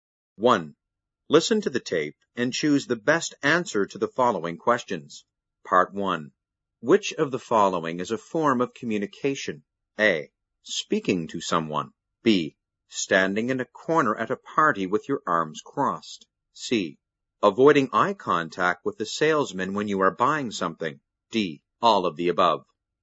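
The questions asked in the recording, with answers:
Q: Which of the following is a form of communication?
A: D: All of the above.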